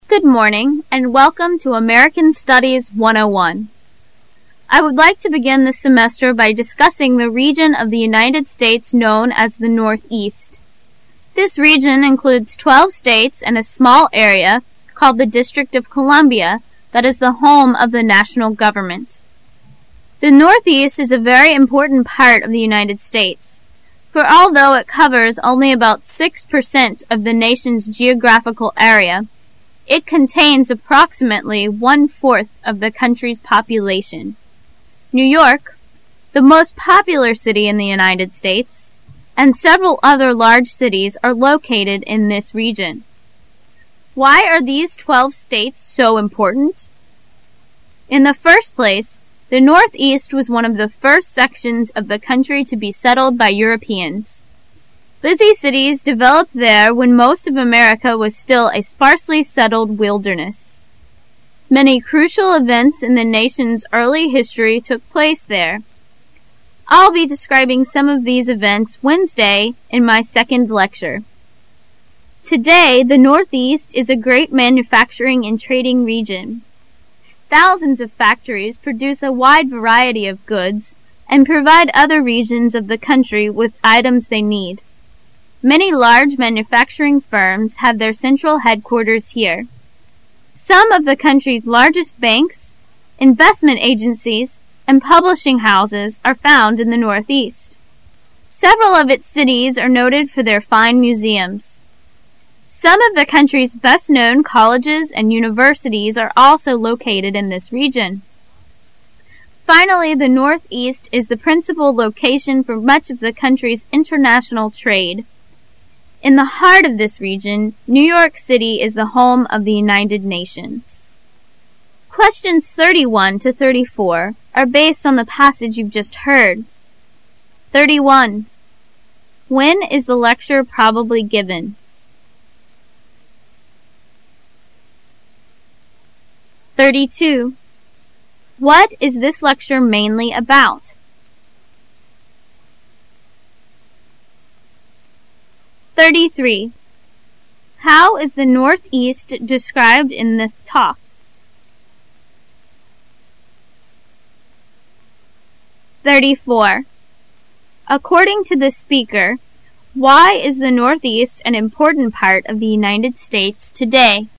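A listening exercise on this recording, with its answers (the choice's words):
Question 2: What is this lecture mainly about?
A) The people of the Northeast.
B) The significance of the Northeast.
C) The development of the United States.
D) The location of the nation's capital.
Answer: The significance of the Northeast.

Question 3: How is the Northeast described in the talk?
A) Small area, small population.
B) Small area, large population.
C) Large area, small population.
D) Large area, large population.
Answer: Small area, large population.

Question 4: According to the speaker why is the Northeast an important part of the United States today?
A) It is visited by many tourists.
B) It was never a wilderness like the rest of the country.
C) It is the home of many modern historians.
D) It is both a business and cultural center.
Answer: It is both a business and cultural center.

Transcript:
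I would like to begin this semester by discussing the region of the United States known as the Northeast. This region includes twelve states and a small area called the District of Columbia that is the home of the national government. The Northeast is a very important part of the United States, for although it covers only about six percent of the nation's geographical area, it contains approximately one- fourth of the country's population. New York, the most popular city in the United States, and several other large cities are located in this region. Why are these twelve states so important? In the first place, the Northeast was one of the first sections of the country to be settled by Europeans. Busy cities developed there when most of America was still a sparsely settled wilderness. Many crucial events in the nation's early history took place there. I'll be describing some of those events Wednesday in my second lecture. 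Today the Northeast is a great manufacturing and trading region. Thousands of factories produce a wide variety of goods and provide other regions of the country with items they need. Many large manufacturing firms have their central headquarters here. Some of the country's largest banks, investment agencies, and publishing houses are found in the Northeast. Several of its cities are noted for their fine museums. Some of the country's best known colleges and universities are also located in this region. Finally the Northeast is the principal location for much of the country's international trade. In the heart of this region New York City is the home of the United Nations. Questions 31 to 34 are based on the passage you've just heard: 31. When is the lecture probably given?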